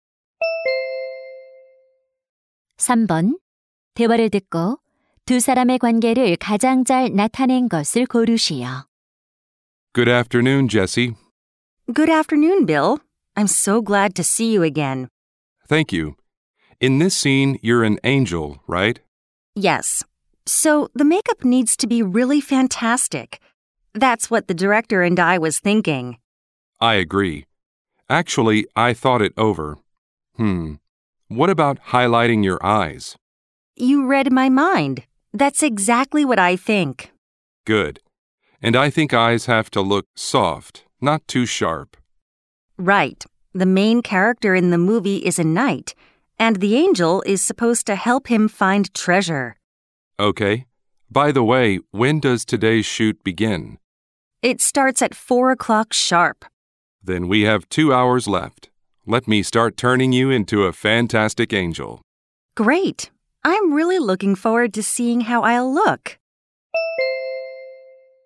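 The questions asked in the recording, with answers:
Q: 대화를 듣고 두 사람의 관계를 가장 잘 나타낸 것을 고르시오.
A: 분장사 - 배우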